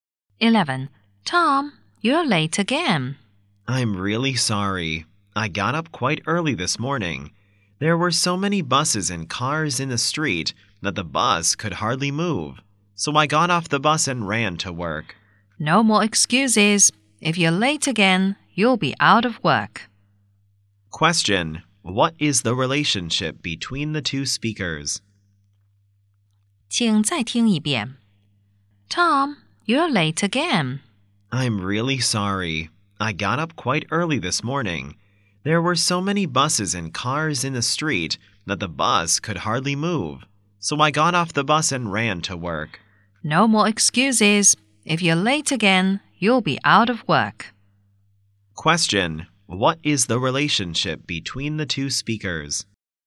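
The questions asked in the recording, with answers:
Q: Question: What is the relationship between the two speakers?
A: Boss and employee.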